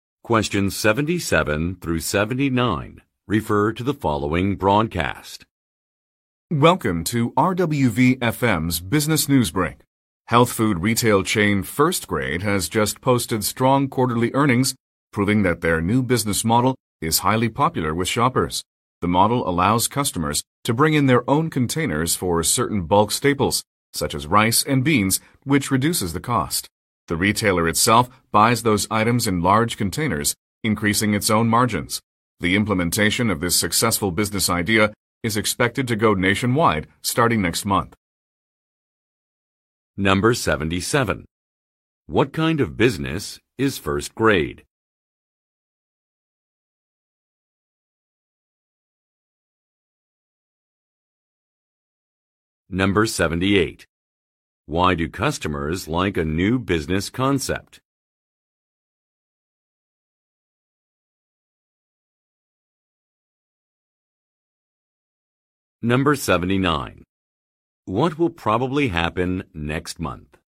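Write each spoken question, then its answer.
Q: What kind of business is First Grade?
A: A health food retail chain

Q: Why do customers like a new business concept?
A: Bringing their own containers for bulk staples reduces the cost

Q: What will probably happen next month?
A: The business idea will be implemented nationwide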